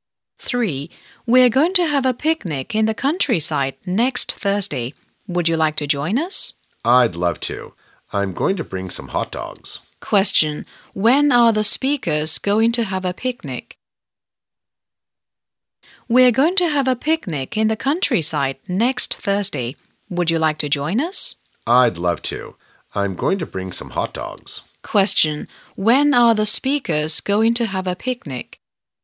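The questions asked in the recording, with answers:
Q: When are the speakers going to have a picnic?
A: Next Thursday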